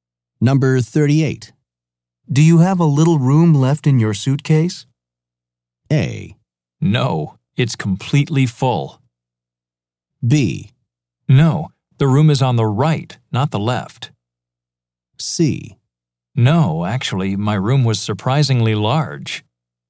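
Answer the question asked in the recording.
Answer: A: No, it's completely full.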